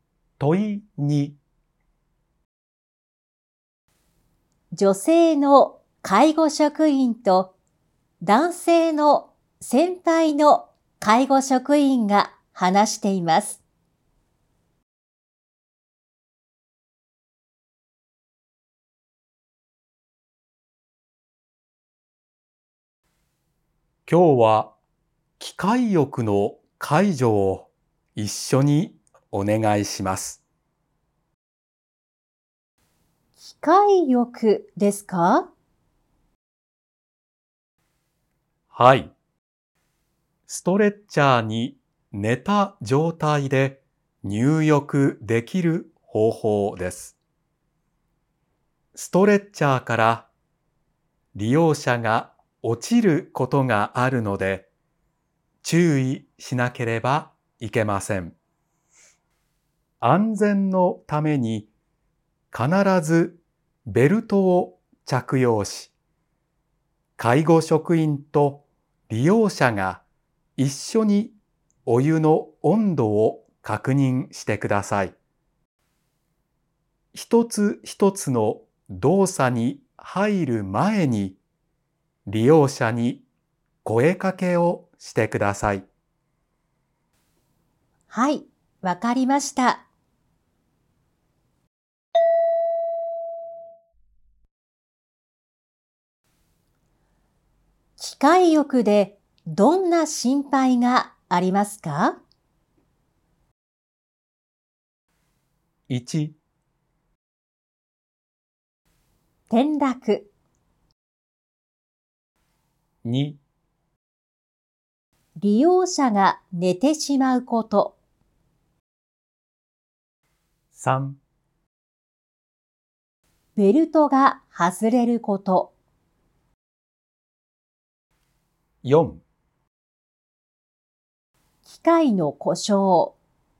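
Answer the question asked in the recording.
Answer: 1: 転落。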